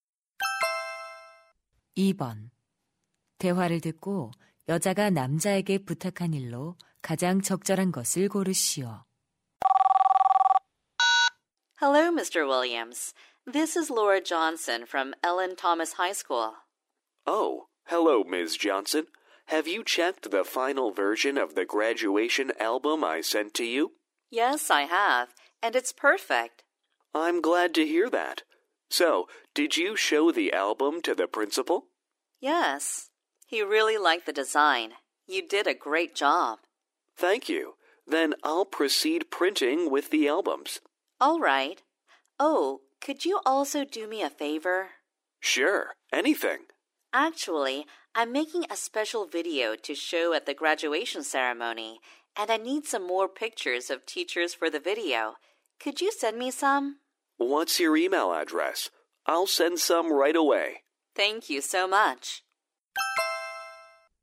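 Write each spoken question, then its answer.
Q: 대화를 듣고 여자가 남자에게 부탁한 일로 가장 적절한 것을 고르시오.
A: 교사들 사진 더 보내 주기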